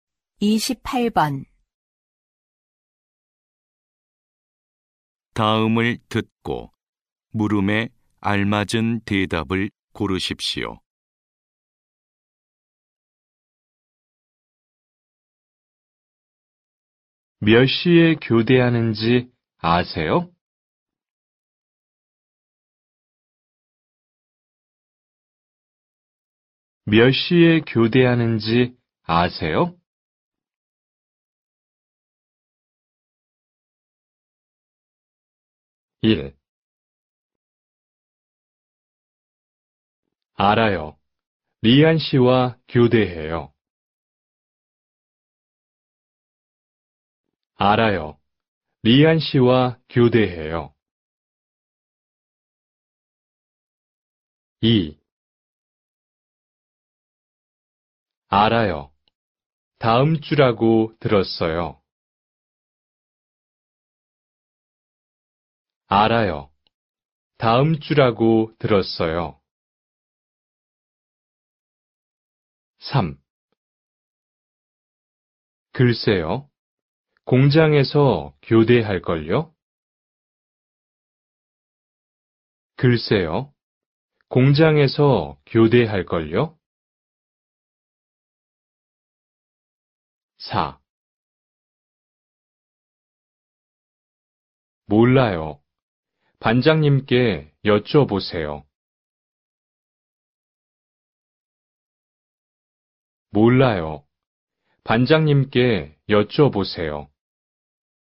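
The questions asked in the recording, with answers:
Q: 몇 시에 교대하는지 아세요?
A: 4: 몰라요. 반장님께 여쭤보세요.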